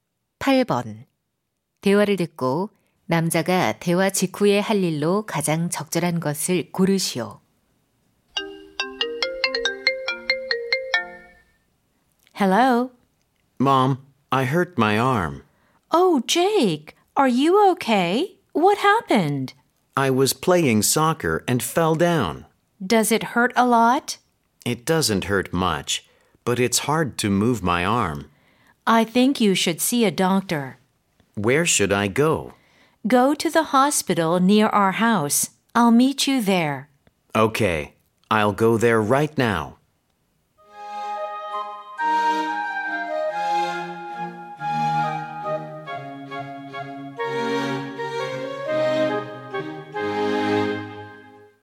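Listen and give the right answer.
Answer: 병원에 가기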